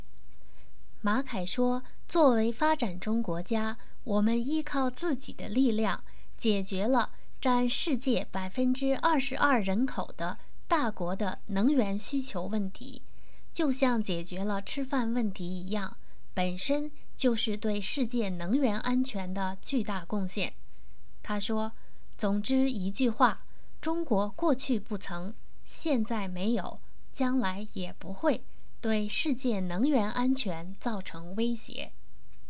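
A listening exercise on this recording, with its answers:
Please answer the following questions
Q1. What is the great contribution that China makes to the world energy safety?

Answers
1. As a developing country, it has relied on its own strength to meet the energy needs of a country with 22% of the world's population

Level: M.Phil Year 2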